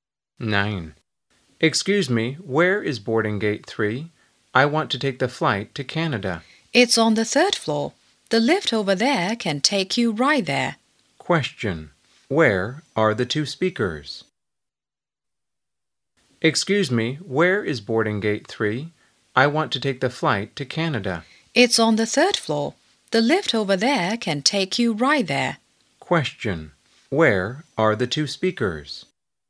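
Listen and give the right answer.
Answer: At the airport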